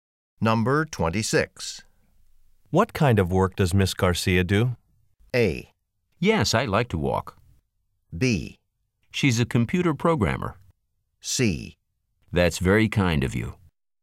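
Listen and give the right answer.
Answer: B: She's a computer programmer.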